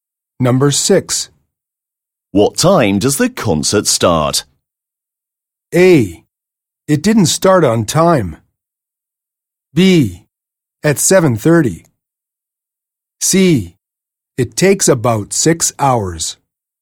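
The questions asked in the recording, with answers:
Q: What time does the concert start?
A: B: At 7:30.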